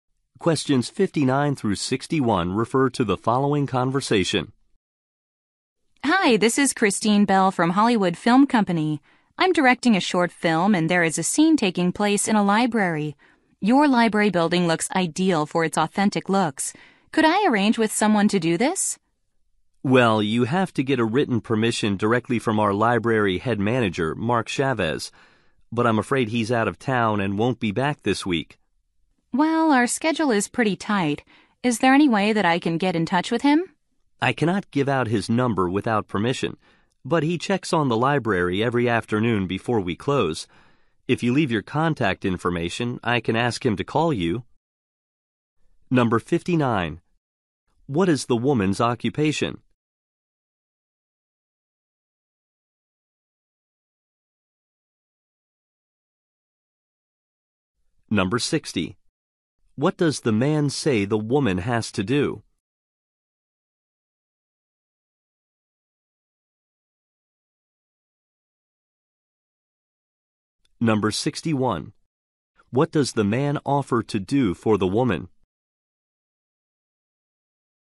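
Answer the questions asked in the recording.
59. Film director
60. Get written permission from the library head manager
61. Ask the manager to call her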